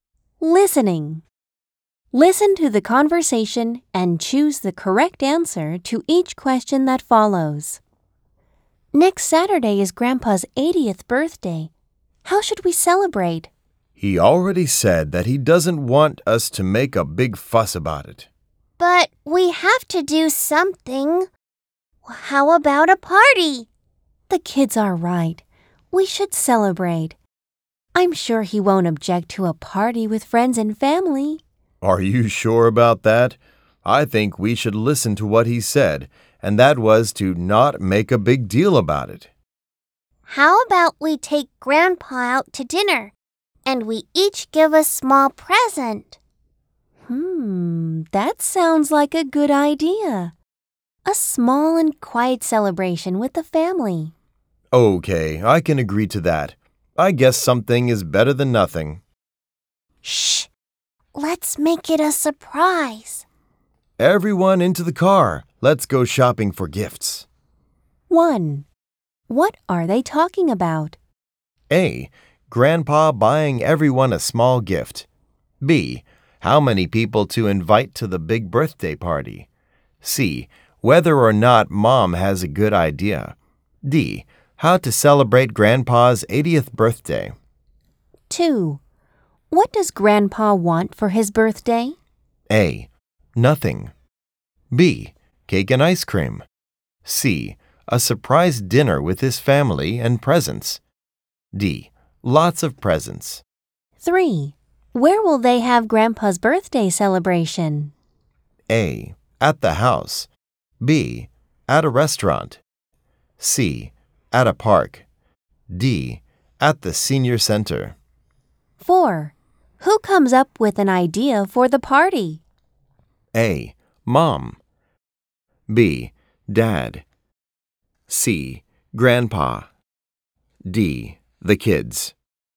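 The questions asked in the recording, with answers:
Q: What are they talking about?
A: D: How to celebrate Grandpa's 80th birthday.

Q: Where will they have Grandpa's birthday celebration?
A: B: At a restaurant.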